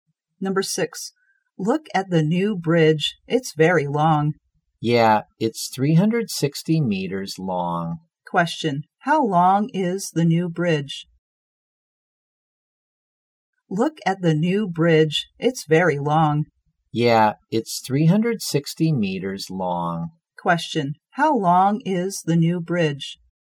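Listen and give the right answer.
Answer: 360 meters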